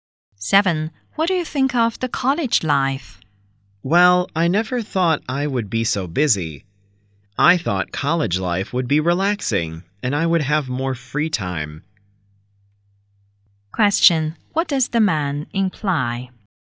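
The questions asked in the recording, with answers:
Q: What does the man imply?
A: College life is busier than he expected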